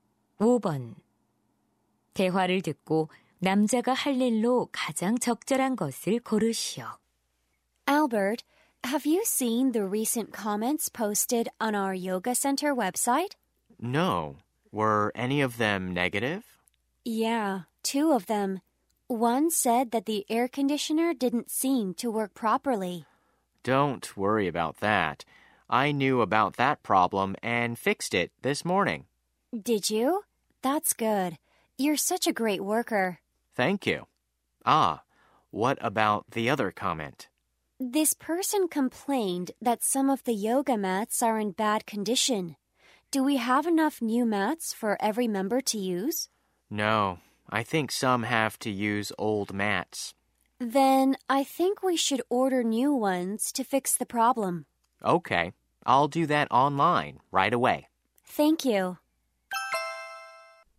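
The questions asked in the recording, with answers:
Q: 대화를 듣고 남자가 할 일로 가장 적절한 것을 고르시오.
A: 새 요가 매트 온라인 주문하기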